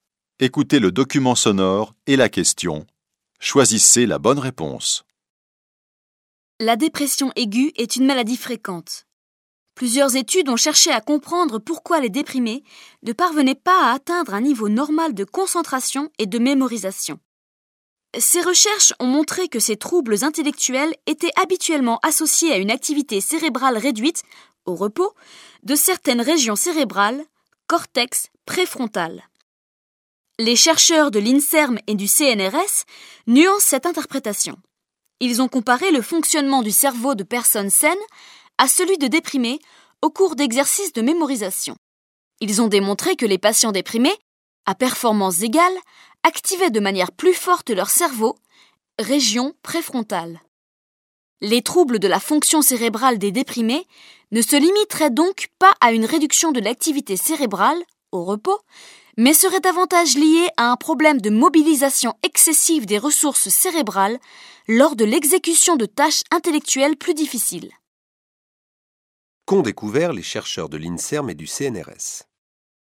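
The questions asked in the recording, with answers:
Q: Qu'ont découvert les chercheurs de l'INSERM et du CNRS ?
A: Qu'à performance égale, les déprimés activent plus fortement leur cerveau (région préfrontale) : une mobilisation excessive des ressources cérébrales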